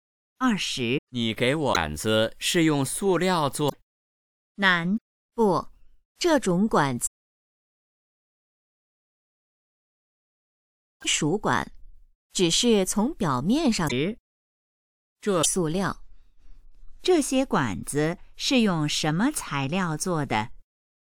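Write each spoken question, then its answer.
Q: 这些管子是用什么材料做的?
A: 金属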